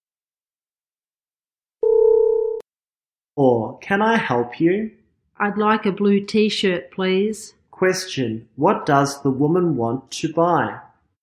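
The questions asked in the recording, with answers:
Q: What does the woman want to buy?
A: A blue T-shirt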